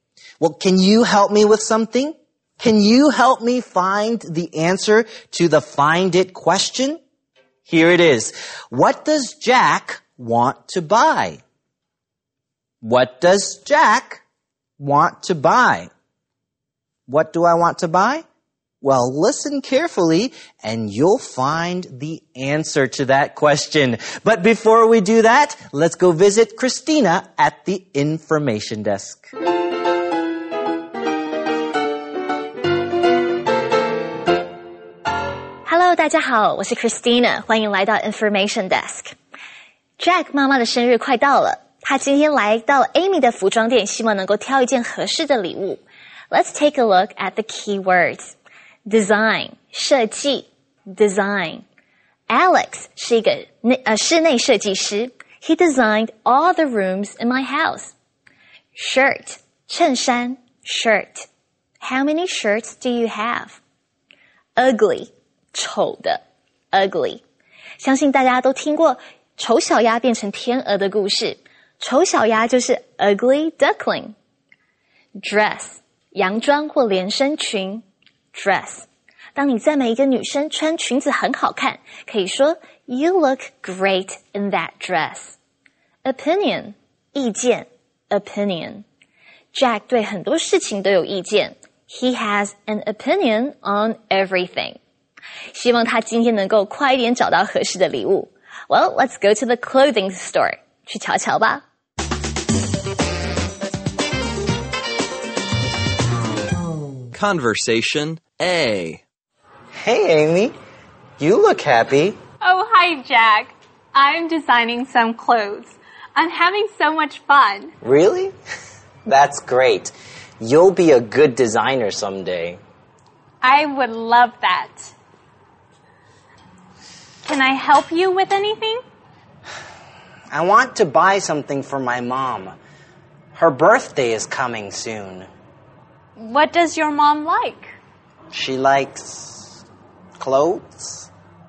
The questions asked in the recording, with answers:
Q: What does Jack want to buy?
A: Jack wants to buy something for his mom.